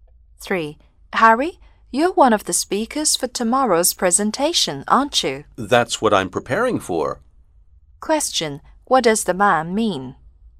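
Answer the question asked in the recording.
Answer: Yes, he is one of the speakers and is preparing for it.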